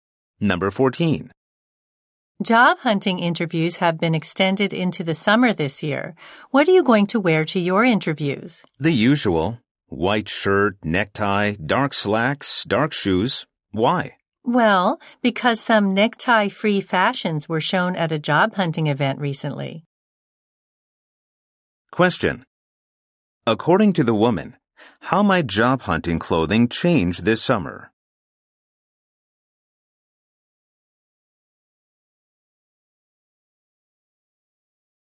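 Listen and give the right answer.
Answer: Job hunters might not wear neckties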